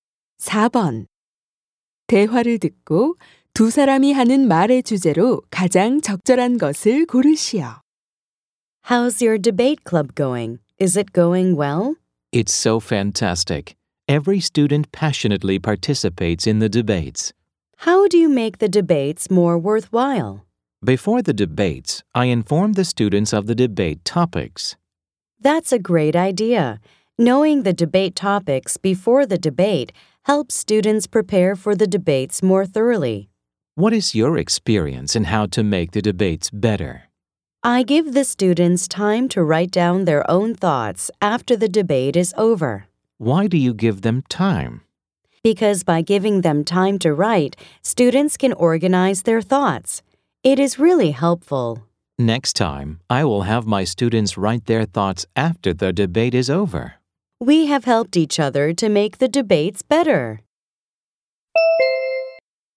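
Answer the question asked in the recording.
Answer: 토론 수업을 더 효과적으로 만드는 방법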